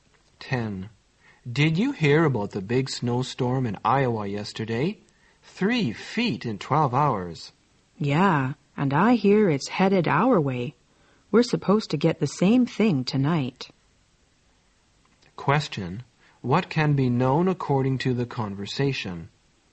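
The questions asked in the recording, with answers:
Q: What can be known according to the conversation?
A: A big snowstorm is expected where they are tonight.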